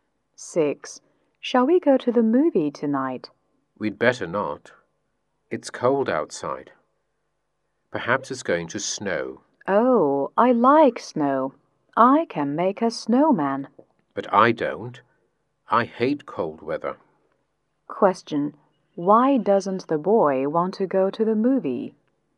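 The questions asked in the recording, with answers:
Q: Why doesn't the boy want to go to the movie?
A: Because it's cold outside and he hates cold weather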